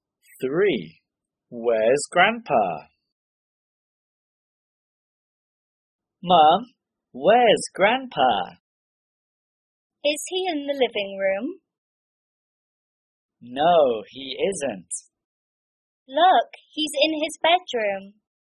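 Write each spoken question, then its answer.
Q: Where's Grandpa?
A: in his bedroom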